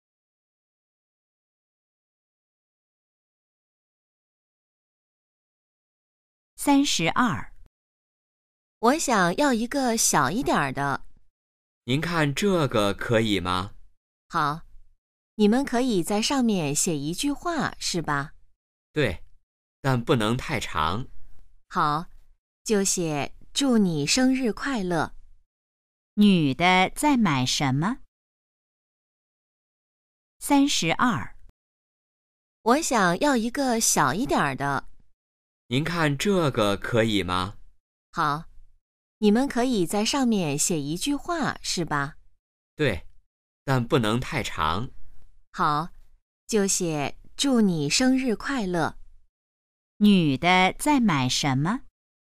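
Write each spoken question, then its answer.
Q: 女的在买什么?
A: 生日蛋糕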